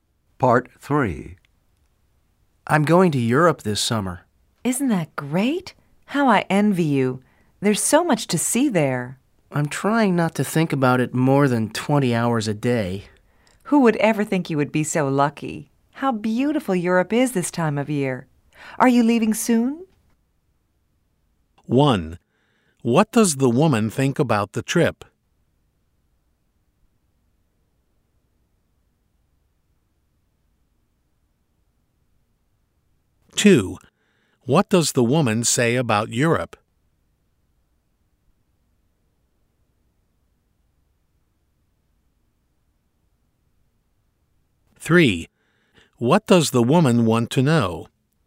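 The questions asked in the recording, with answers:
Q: What does the woman think about the trip?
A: She envies him; he's lucky

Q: What does the woman say about Europe?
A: It is beautiful this time of year

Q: What does the woman want to know?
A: If he is leaving soon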